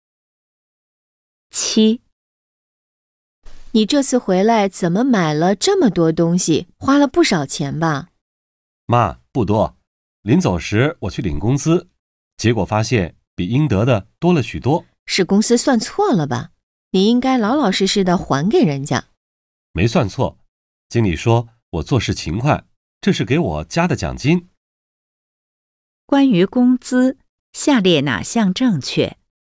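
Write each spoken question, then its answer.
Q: 关于工资,下列哪项正确?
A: 多出的是经理给他加的奖金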